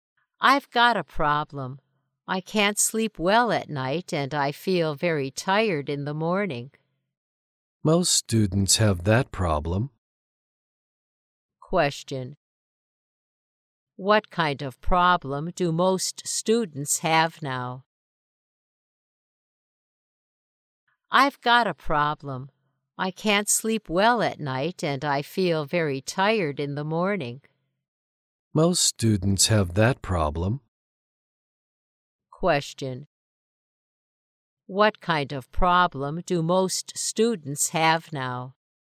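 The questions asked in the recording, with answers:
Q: Question. What kind of problem do most students have now?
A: They can't sleep well at night and feel very tired in the morning.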